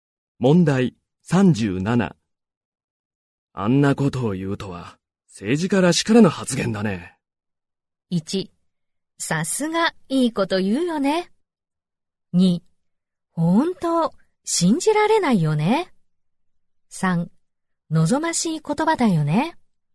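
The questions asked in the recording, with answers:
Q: あんなことを言うとは、政治家らしからぬ発言だね。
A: 2: 本当、信じられないよね。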